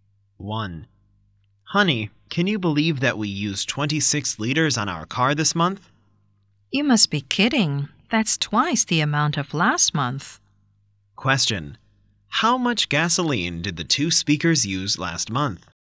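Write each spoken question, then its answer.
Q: How much gasoline did the two speakers use last month?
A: 13 liters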